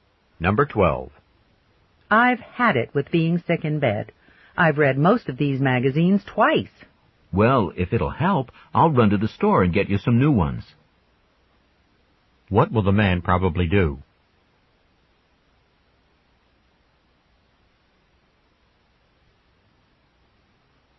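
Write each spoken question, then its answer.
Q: What will the man probably do?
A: Go to the store to buy new magazines.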